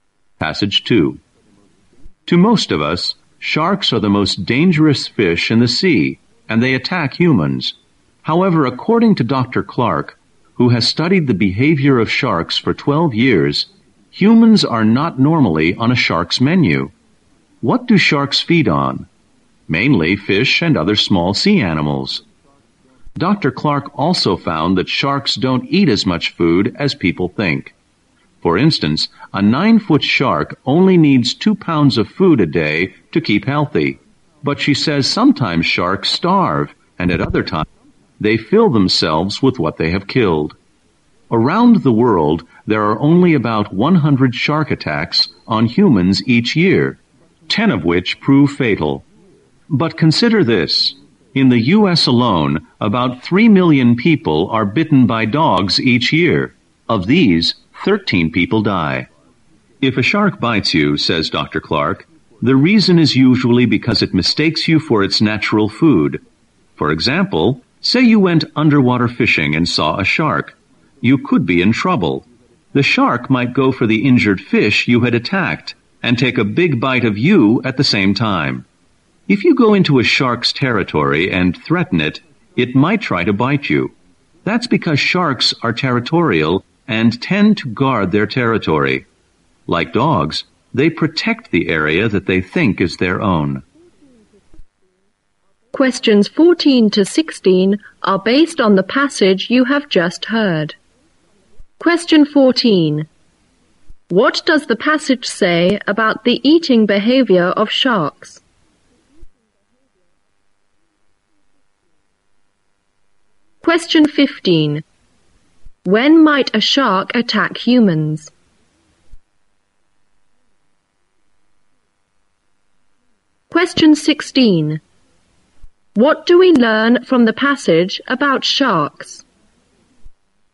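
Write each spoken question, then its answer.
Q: When might a shark attack humans?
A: When its territory is invaded or it mistakes them for food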